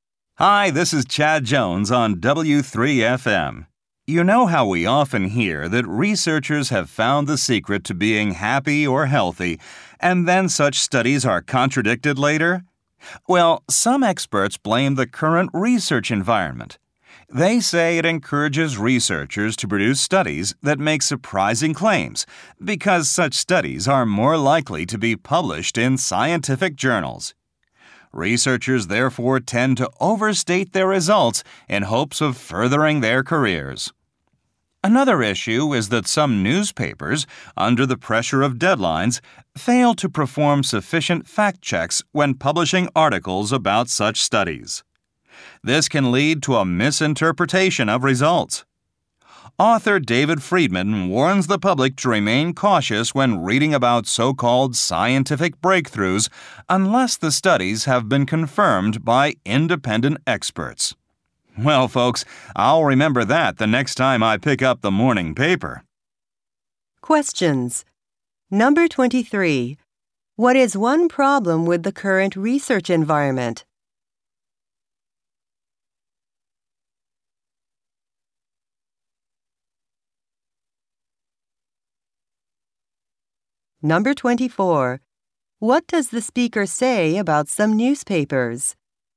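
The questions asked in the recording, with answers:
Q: What is one problem with the current research environment?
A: It encourages researchers to make surprising claims and overstate their results so their studies get published.

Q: What does the speaker say about some newspapers?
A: Because of deadline pressure, they don't check the facts enough before publishing articles about such studies.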